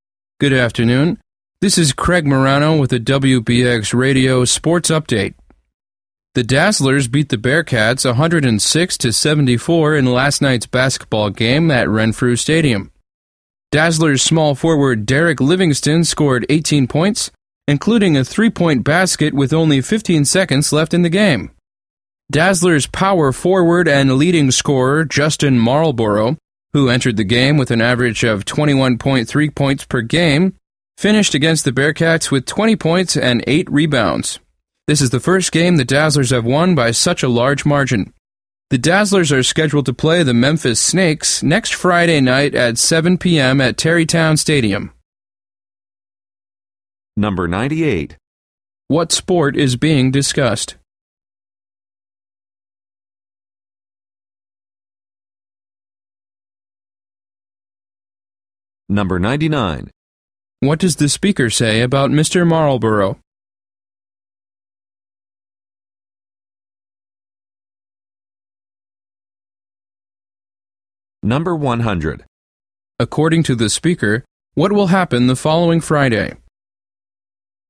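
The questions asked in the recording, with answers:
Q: What sport is being discussed?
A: Basketball

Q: According to the speaker, what will happen the following Friday?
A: The Dazzlers will play the Memphis Snakes at Tarrytown Stadium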